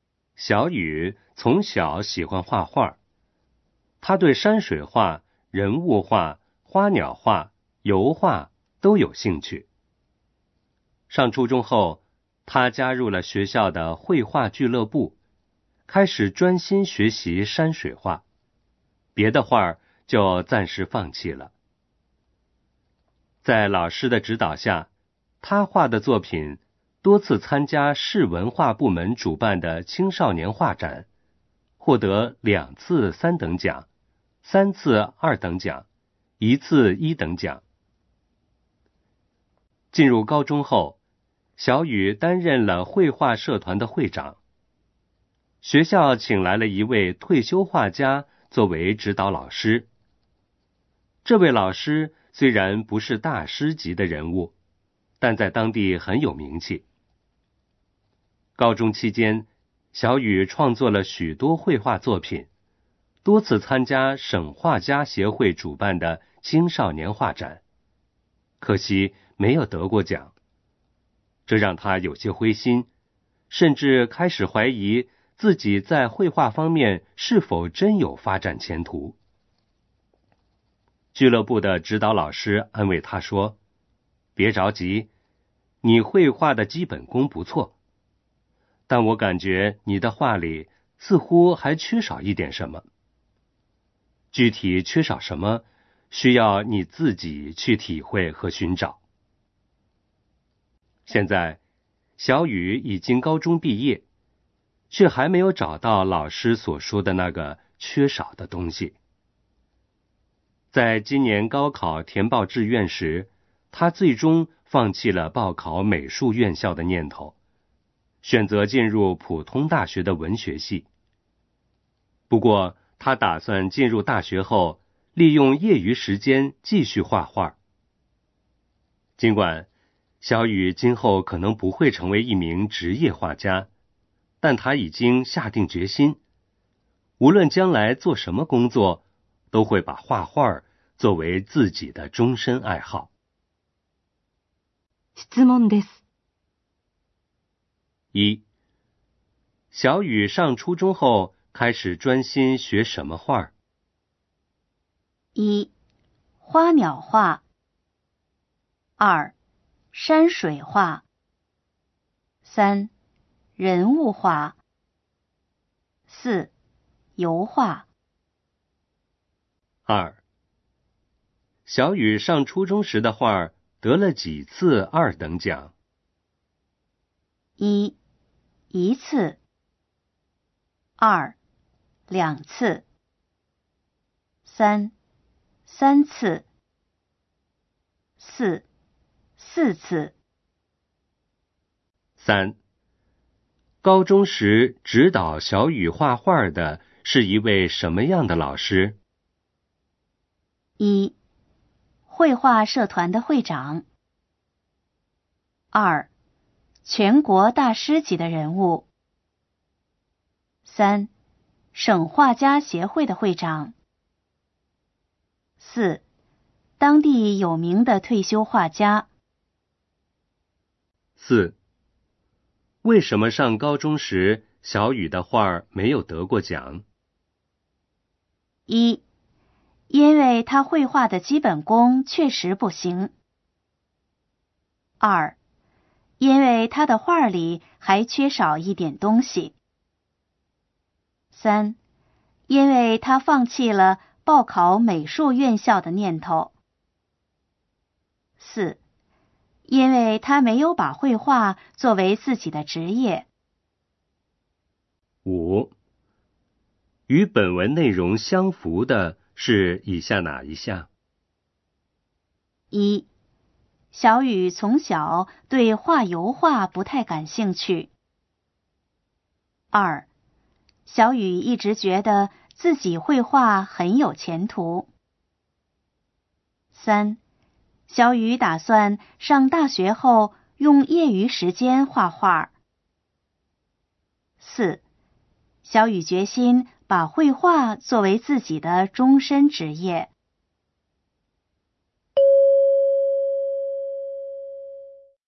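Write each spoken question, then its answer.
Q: 小雨上初中后开始专心学什么画?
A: 二: 山水画

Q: 小雨上初中时的画得了几次二等奖?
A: 三: 三次

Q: 高中时指导小雨画画的是一位什么样的老师?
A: 四: 当地有名的退休画家

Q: 为什么上高中时小雨的画没有得过奖?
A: 二: 因为他的画里还缺少一点东西

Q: 与本文内容相符的是以下哪一项?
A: 三: 小雨打算上大学后用业余时间画画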